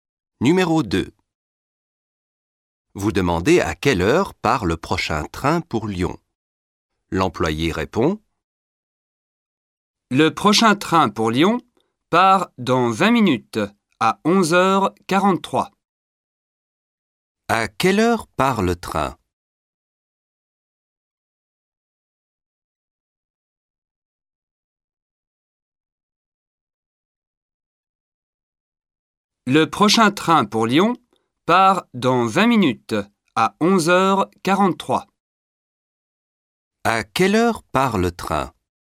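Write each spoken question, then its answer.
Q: À quelle heure part le train?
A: à 11h43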